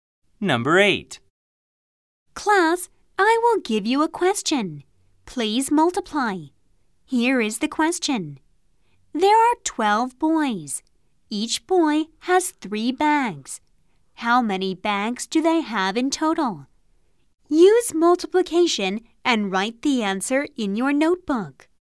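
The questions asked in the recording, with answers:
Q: How many bags do they have in total?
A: 36 bags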